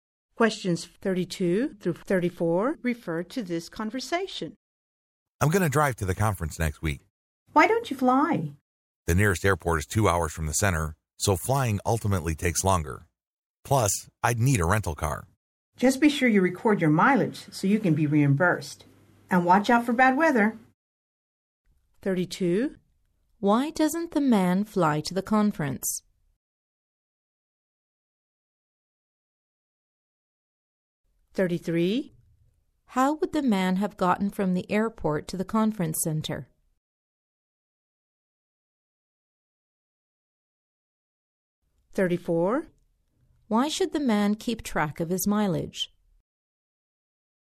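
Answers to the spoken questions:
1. The nearest airport is 2 hours away, so flying takes longer
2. By rental car
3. So he can be reimbursed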